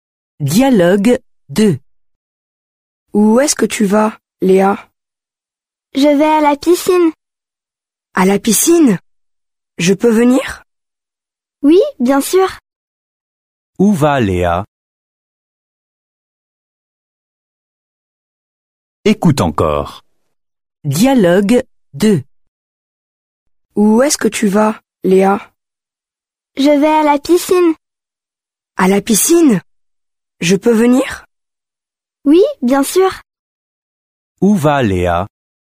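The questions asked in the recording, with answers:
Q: Où va Léa?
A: À la piscine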